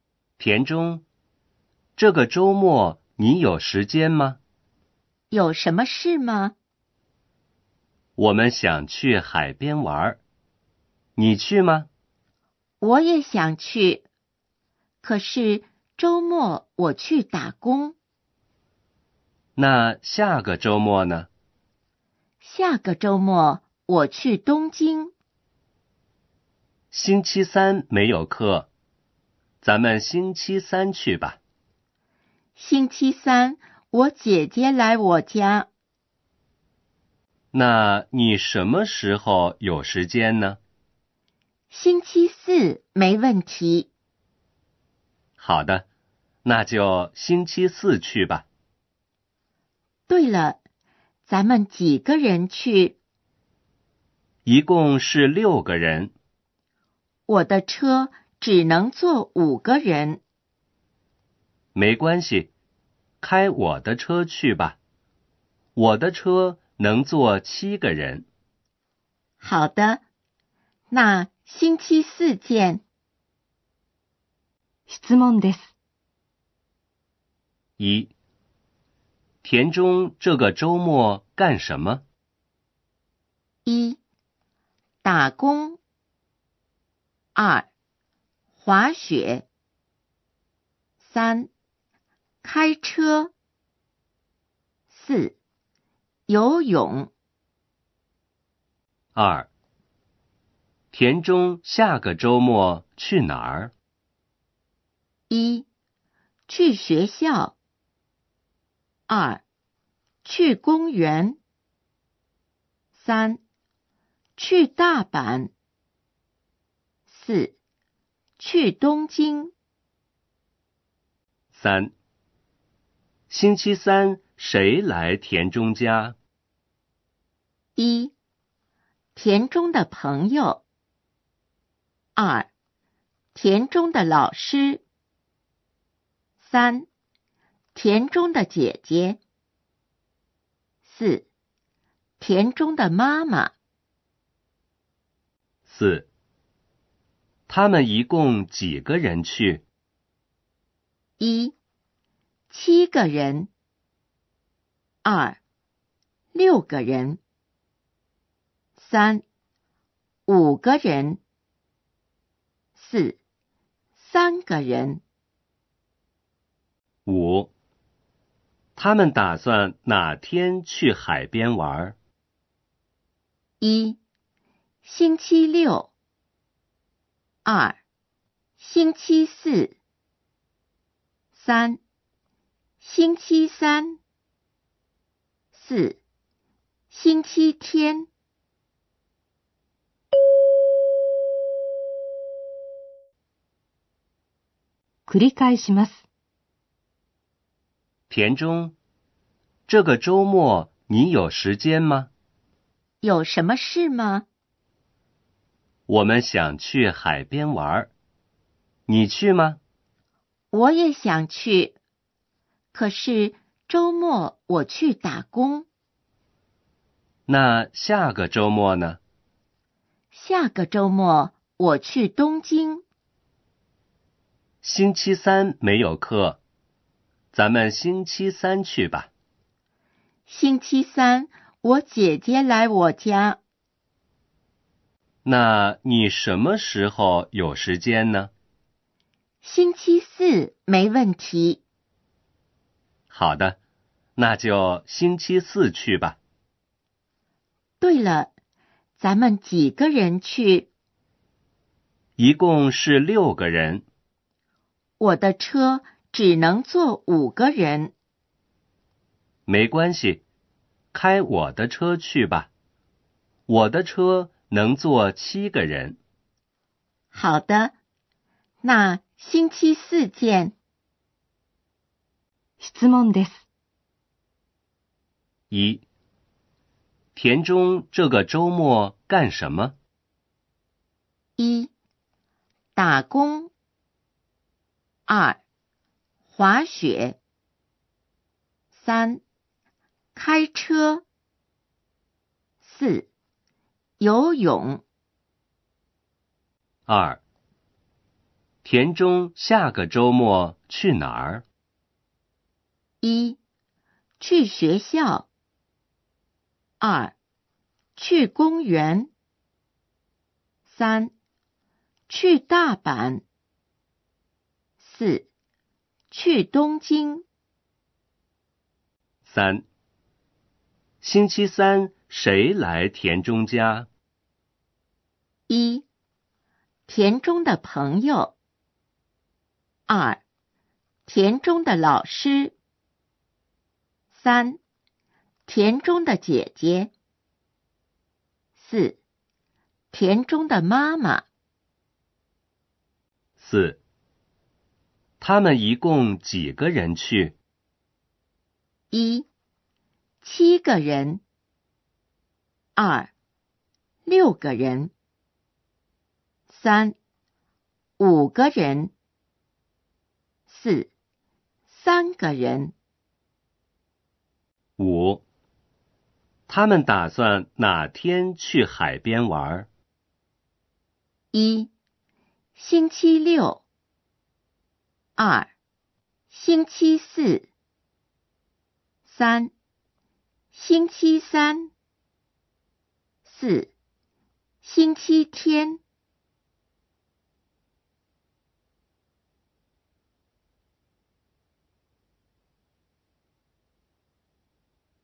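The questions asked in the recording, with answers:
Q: 田中这个周末干什么?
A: 1: 打工。

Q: 田中下个周末去哪儿?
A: 4: 去东京。

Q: 星期三谁来田中家?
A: 3: 田中的姐姐。

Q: 他们一共几个人去?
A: 2: 6个人。

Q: 他们打算哪天去海边玩?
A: 2: 星期四。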